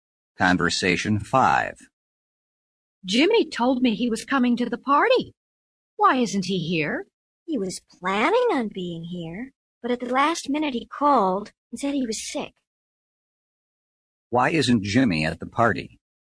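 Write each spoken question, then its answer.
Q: Why isn't Jimmy at the party?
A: He is sick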